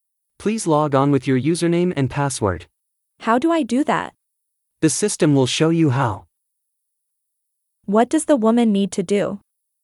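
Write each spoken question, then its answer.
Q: What does the woman need to do?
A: Log on with her username and password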